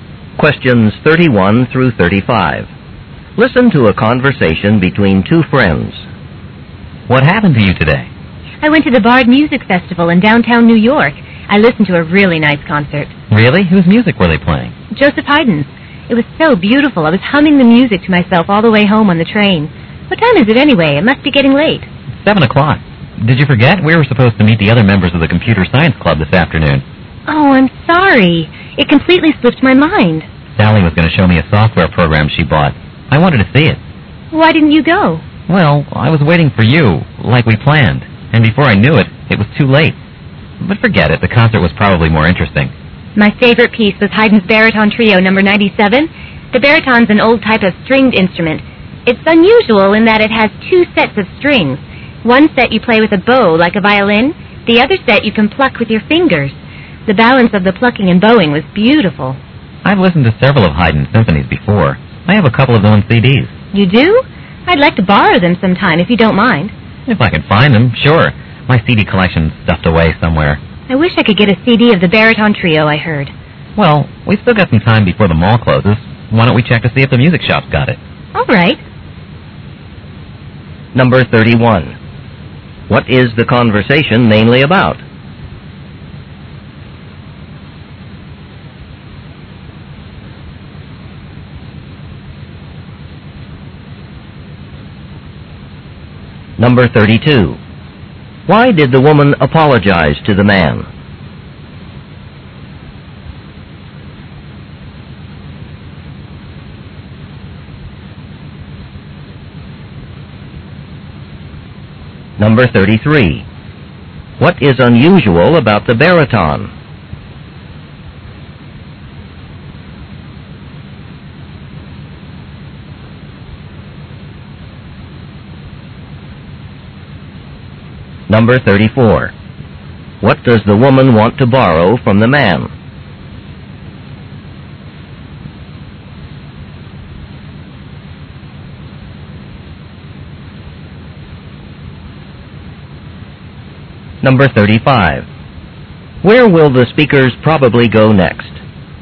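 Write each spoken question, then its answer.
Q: What is the conversation mainly about?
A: A concert of Haydn's music the woman attended

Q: Why did the woman apologize to the man?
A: She forgot about their Computer Science Club meeting

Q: What is unusual about the baritone?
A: It has two sets of strings

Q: What does the woman want to borrow from the man?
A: His CDs of Haydn's symphonies

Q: Where will the speakers probably go next?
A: To the music shop at the mall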